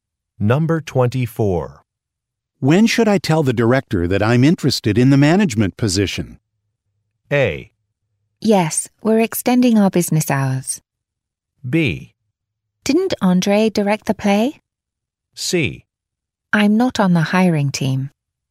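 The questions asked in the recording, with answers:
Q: When should I tell the director that I'm interested in the management position?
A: C: I'm not on the hiring team.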